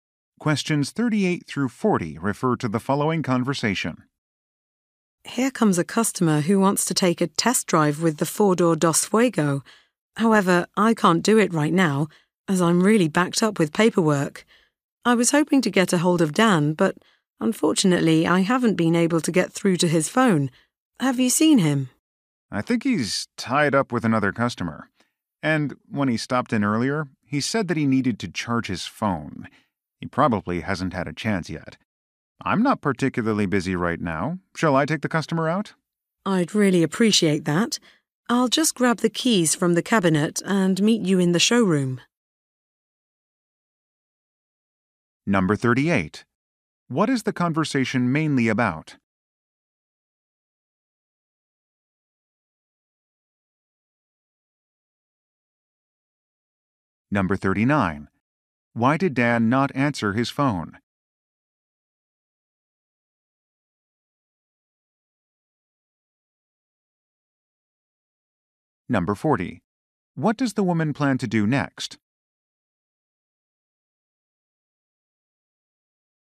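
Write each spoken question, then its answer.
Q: What is the conversation mainly about?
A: Giving a customer a test drive

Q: Why did Dan not answer his phone?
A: His phone needed charging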